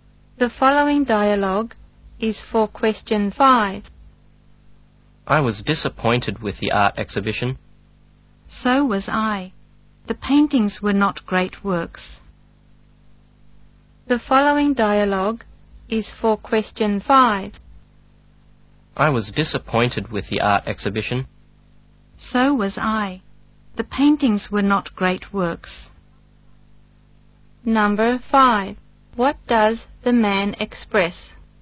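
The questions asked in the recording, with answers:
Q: What does the man express?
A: Disappointment with the art exhibition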